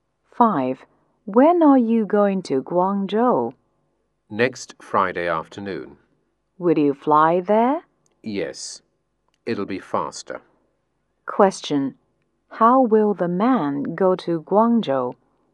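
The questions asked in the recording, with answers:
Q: How will the man go to Guangzhou?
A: By plane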